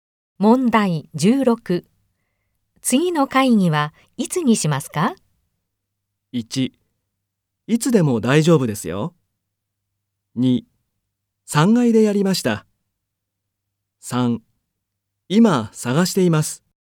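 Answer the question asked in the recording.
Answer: 1: いつでも大丈夫ですよ。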